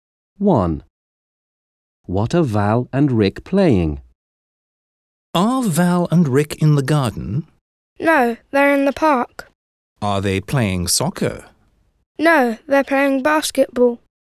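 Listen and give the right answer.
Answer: basketball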